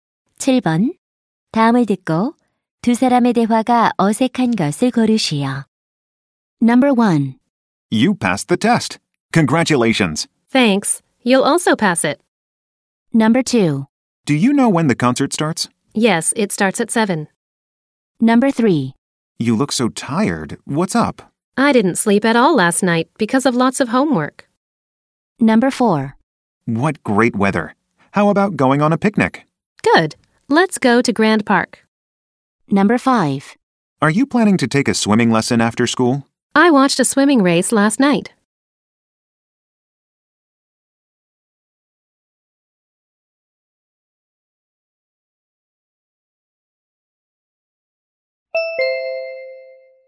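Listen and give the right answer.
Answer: 5: Are you planning to take a swimming lesson after school? / I watched a swimming race last night.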